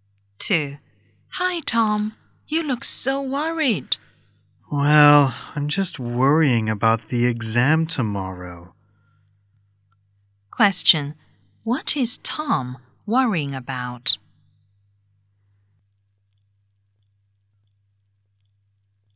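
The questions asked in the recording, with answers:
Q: What is Tom worrying about?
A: The exam tomorrow.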